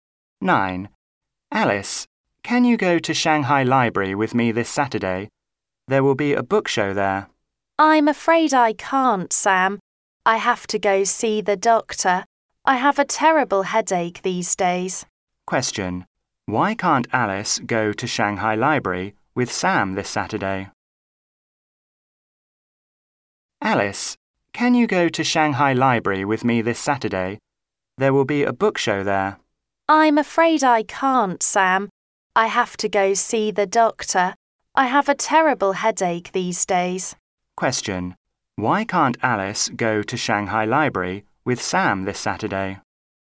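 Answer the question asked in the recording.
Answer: She has to see the doctor because of a terrible headache.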